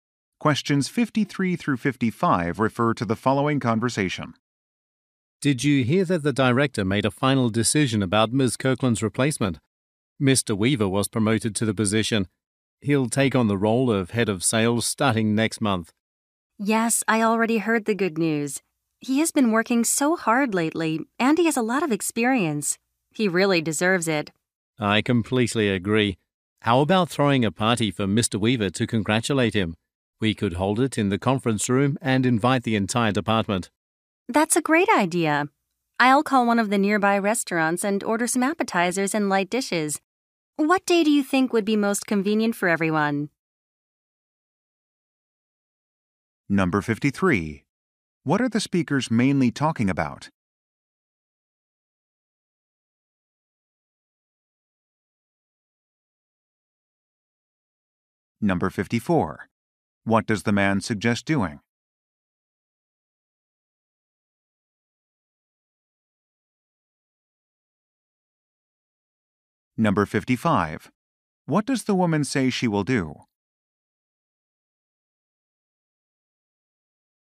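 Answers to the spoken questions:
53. Mr. Weaver's promotion
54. Throwing a party for Mr. Weaver
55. Order food from a nearby restaurant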